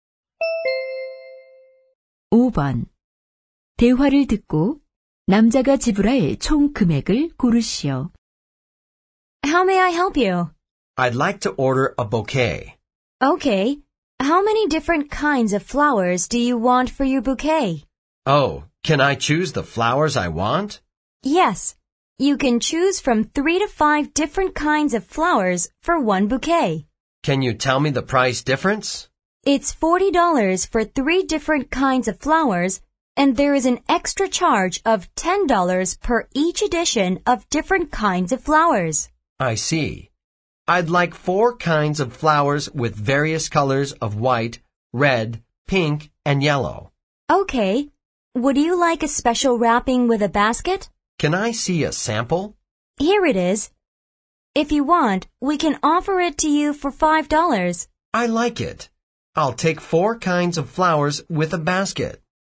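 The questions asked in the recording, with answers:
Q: 대화를 듣고 남자가 지불할 총 금액을 고르시오.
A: $55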